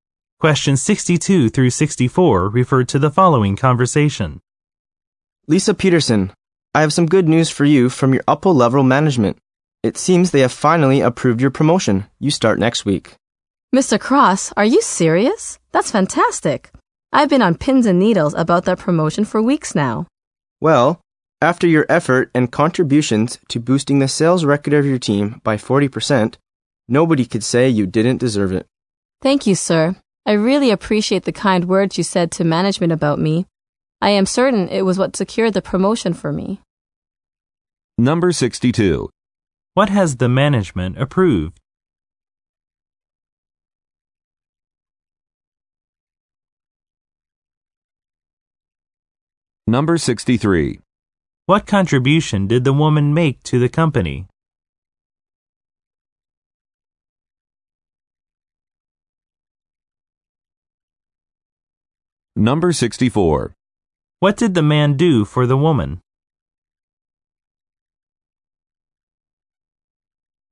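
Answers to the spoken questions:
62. The woman's promotion
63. She boosted her team's sales record by 40%
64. He said kind words about her to management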